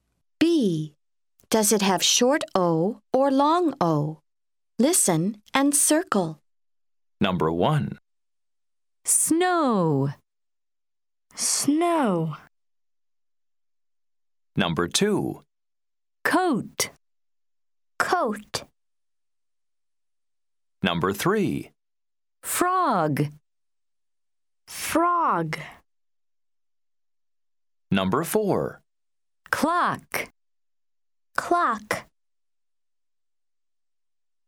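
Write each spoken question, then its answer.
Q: Does it have short O or long O?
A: long O

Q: Does it have short O or long O?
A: long O

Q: Does it have short O or long O?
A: short O

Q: Does it have short O or long O?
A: short O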